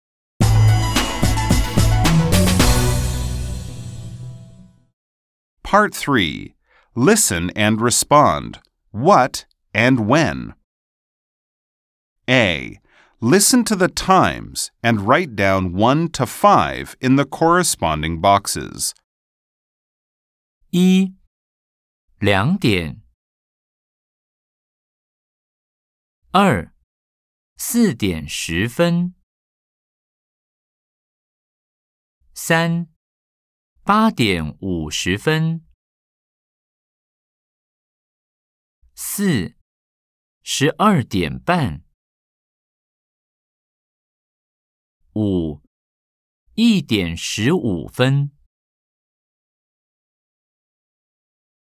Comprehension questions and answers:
A. Nghe thời gian và điền số 1–5 vào các ô tương ứng.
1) 02:00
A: 1

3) 12:30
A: 4

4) 04:10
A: 2

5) 08:50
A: 3